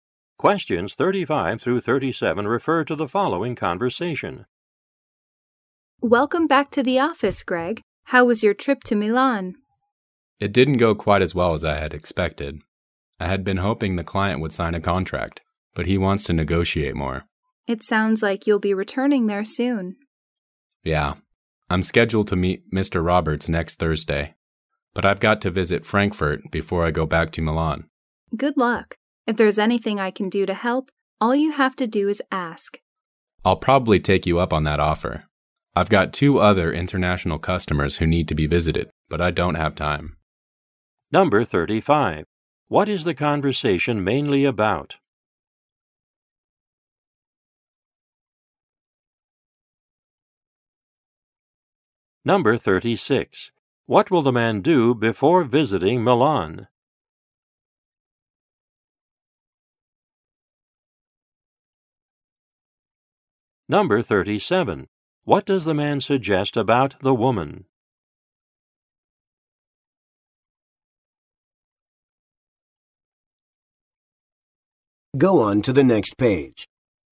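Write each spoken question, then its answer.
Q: What is the conversation mainly about?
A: The man's business trip to Milan

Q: What will the man do before visiting Milan?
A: Visit Frankfurt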